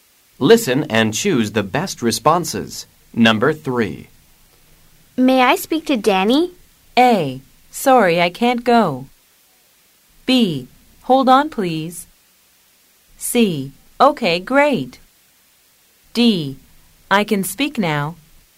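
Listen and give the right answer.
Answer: B: Hold on, please.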